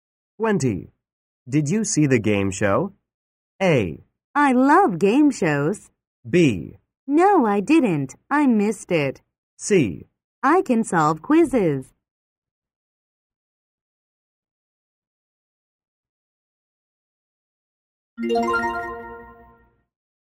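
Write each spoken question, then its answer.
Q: Did you see the game show?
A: B: No, I didn't. I missed it.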